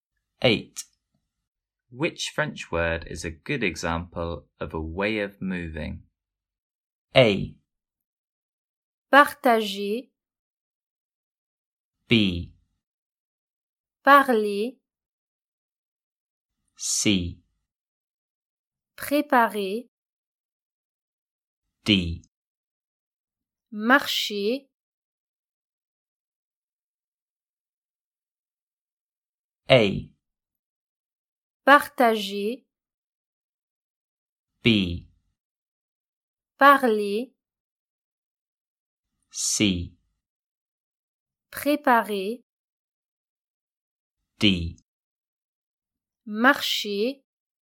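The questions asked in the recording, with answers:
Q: Which French word is a good example of a way of moving?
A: D: Marcher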